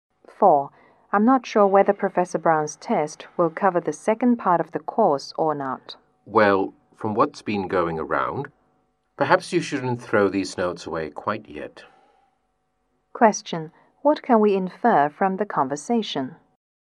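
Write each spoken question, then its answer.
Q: What can we infer from the conversation?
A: The test will probably cover the second part of the course, so keep the notes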